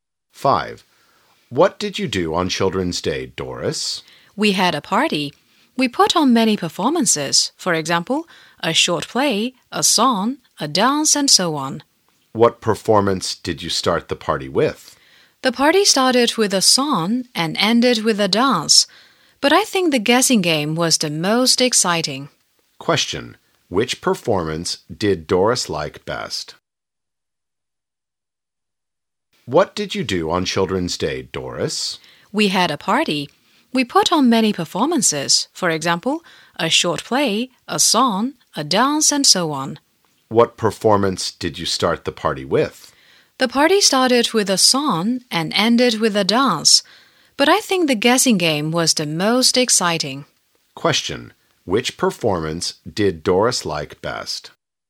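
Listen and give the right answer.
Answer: The guessing game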